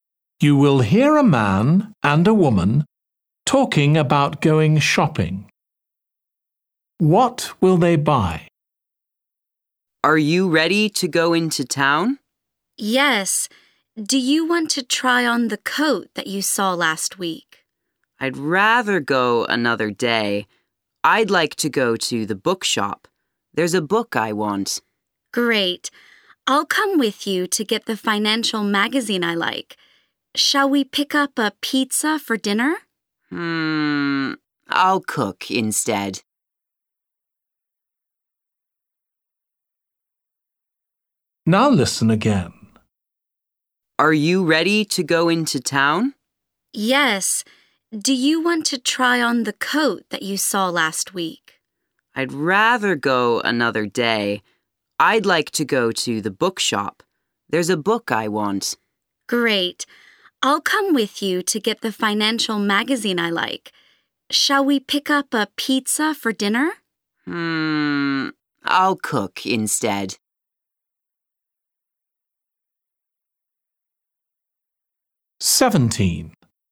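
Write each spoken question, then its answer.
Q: What will they buy?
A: a book and a magazine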